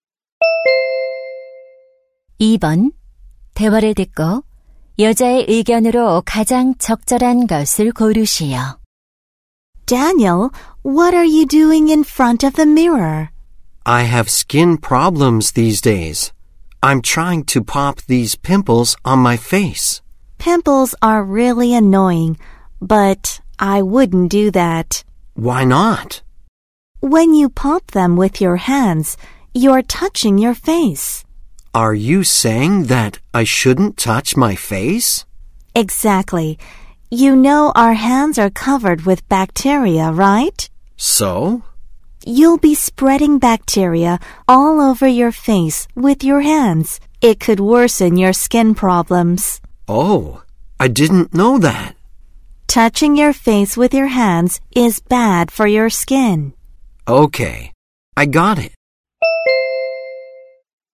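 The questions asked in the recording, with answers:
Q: 대화를 듣고 여자의 의견으로 가장 적절한 것을 고르시오.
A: 손으로 얼굴을 만지는 것은 피부에 나쁘다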